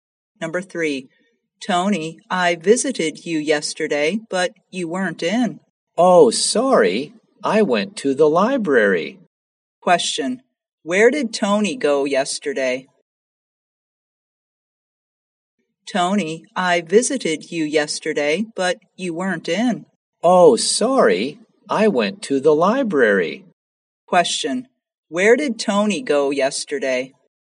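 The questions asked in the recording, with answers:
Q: Where did Tony go yesterday?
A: To the library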